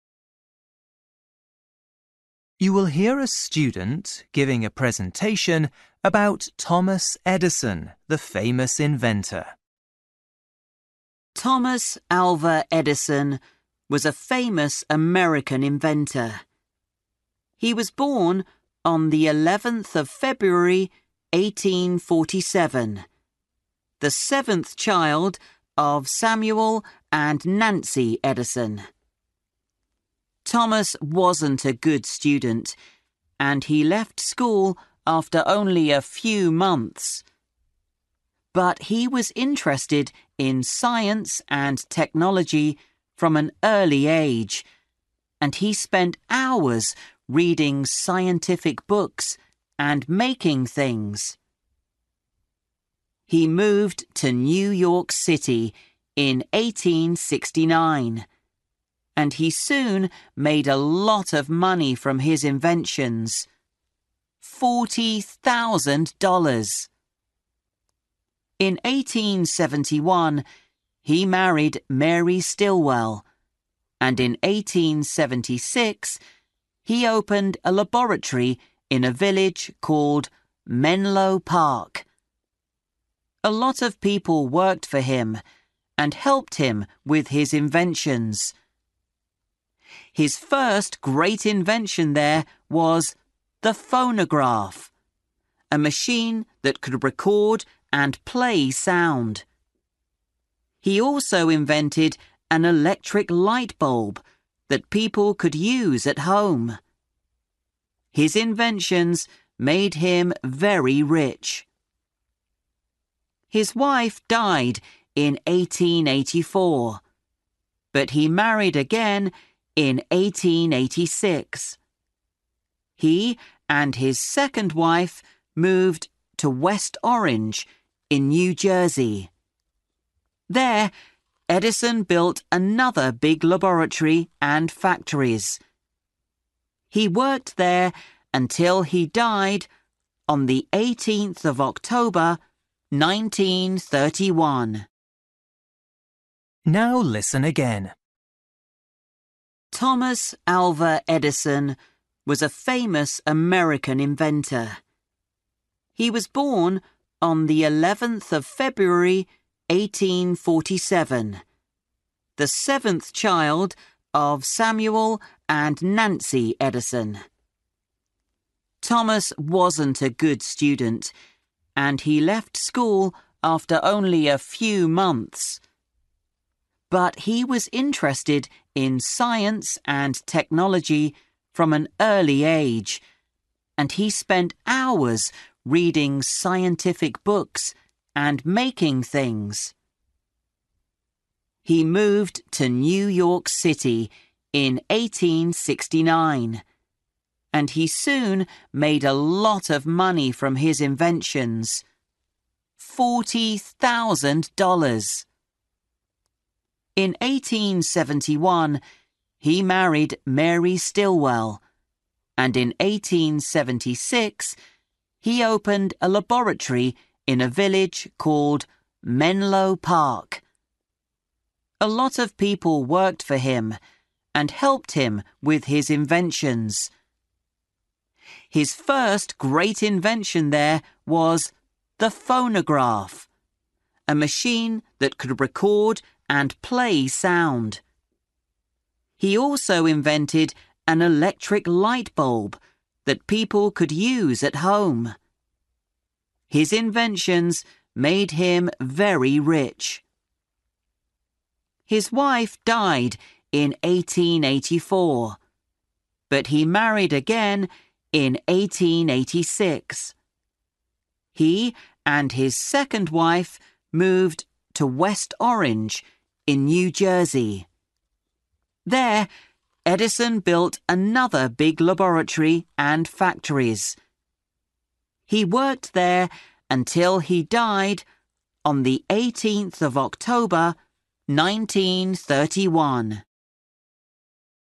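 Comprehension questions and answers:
For each question, write the correct answer in the gap. Write one word or a number or a date or a time.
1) Date of birth : 11 (1) 1847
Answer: February

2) Made: (2) $ from his inventions.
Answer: 40,000

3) 1876: Opened a laboratory in Menlo (3)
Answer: Park

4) 1884: His first wife, Mary Stilwell, (4)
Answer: died

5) Died: 18 October (5)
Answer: 1931

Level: Luyện nghe trình độ A2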